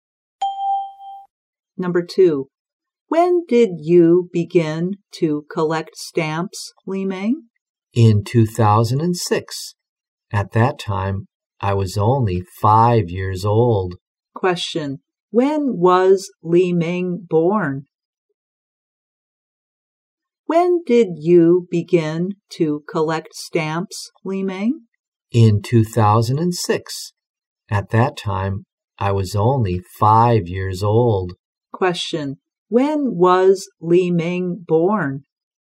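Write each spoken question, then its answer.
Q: When was Li Meng born?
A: In 2001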